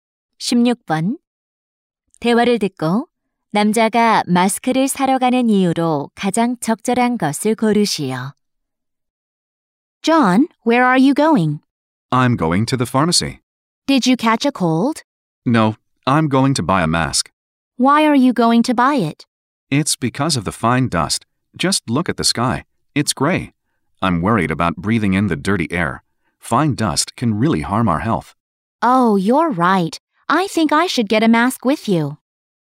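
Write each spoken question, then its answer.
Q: 대화를 듣고 남자가 마스크를 사러 가는 이유로 가장 적절한 것을 고르시오.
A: 미세먼지 때문에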